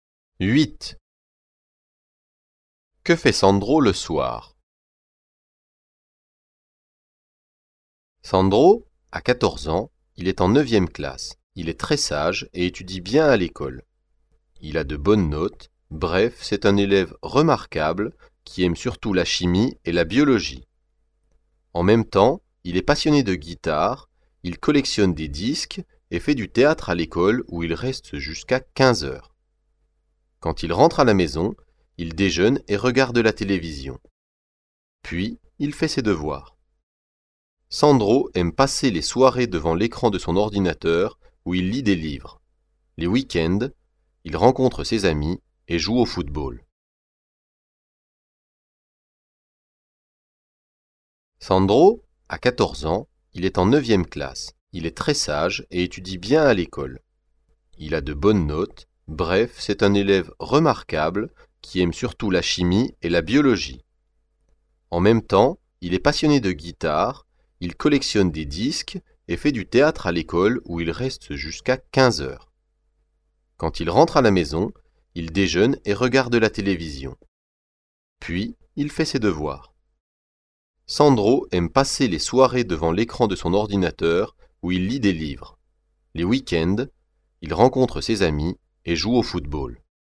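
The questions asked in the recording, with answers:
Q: Que fait Sandro le soir?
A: Il lit des livres sur son ordinateur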